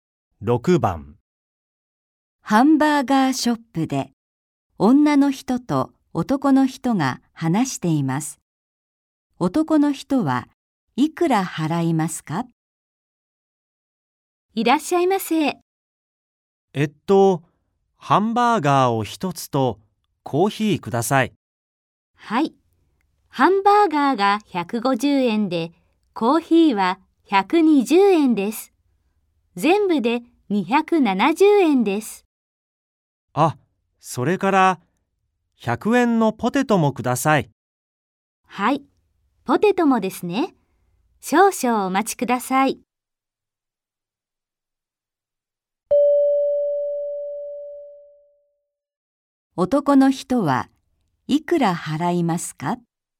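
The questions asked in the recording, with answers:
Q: 男の人はいくら払いますか?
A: 370円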